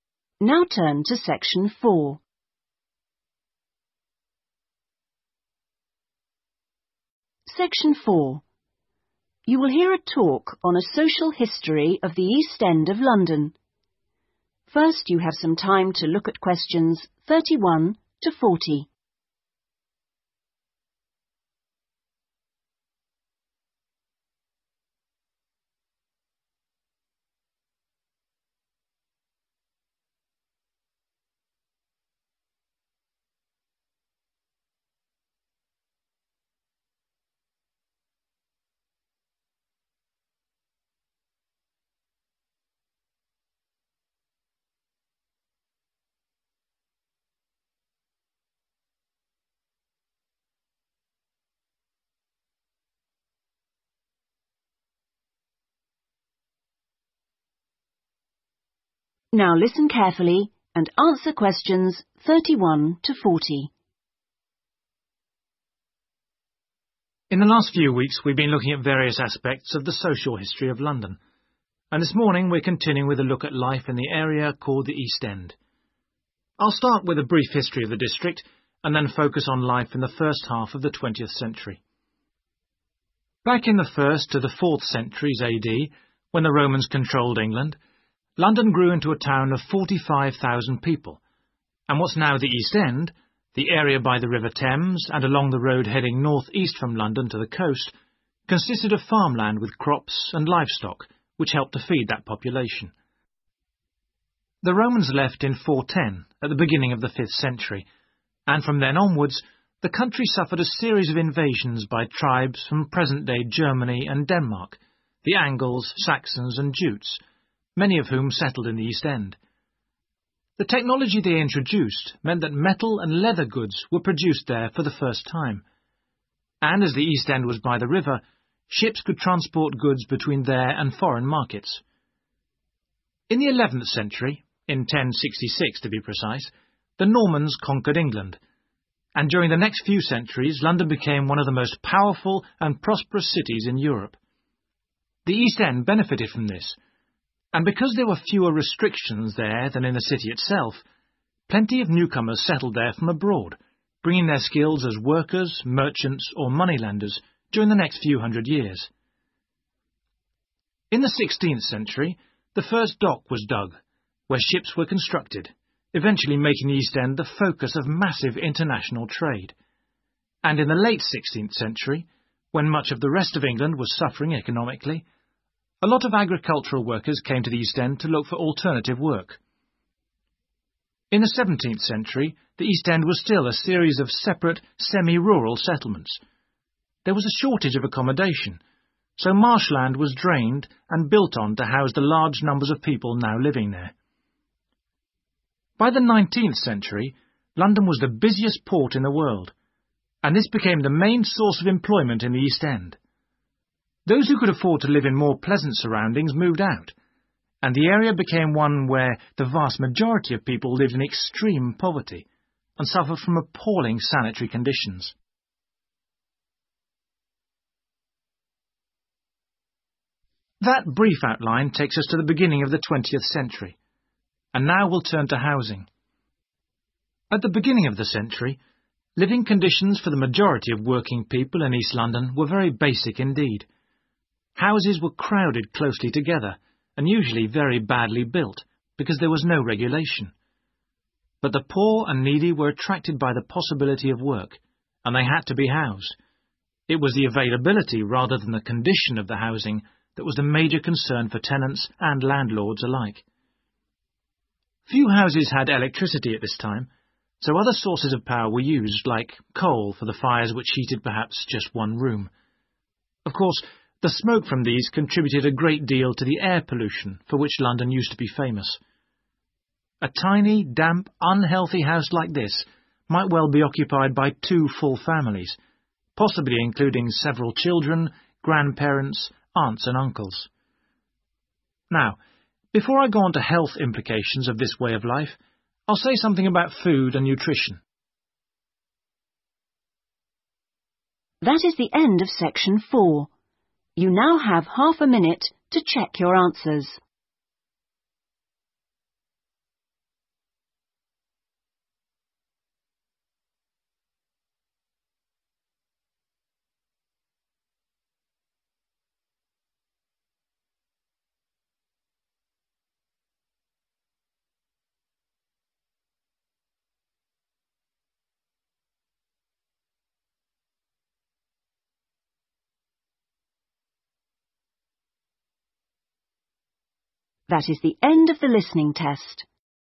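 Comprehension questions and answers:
Complete the table below. Write NO MORE THAN TWO WORDS for each answer.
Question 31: Produce from the area was used to 31........... the people of London.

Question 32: New technology allowed the production of goods made of 32......... and............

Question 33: Lack of 33........... in the East End encouraged the growth of businesses.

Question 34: Construction of facilities for the building of 34............. stimulated international trade.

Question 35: Agricultural workers came from other parts of 35......... to look for work.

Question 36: Marshes were drained to provide land that could be 36............. on.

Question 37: Inhabitants lived in conditions of great 37............. with very poor sanitation.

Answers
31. feed
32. metal and leather
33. restrictions
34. ships
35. England
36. built
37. poverty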